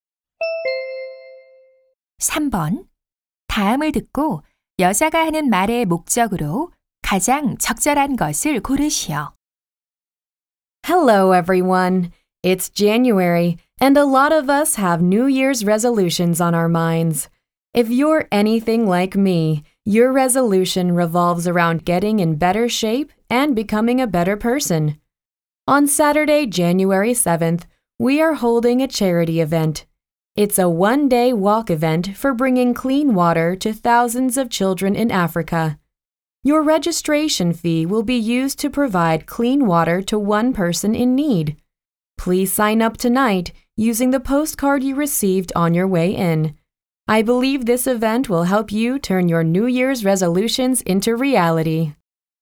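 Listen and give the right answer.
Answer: 아프리카 아이들에게 깨끗한 물을 제공하기 위한 자선 걷기 행사 참가를 독려하려고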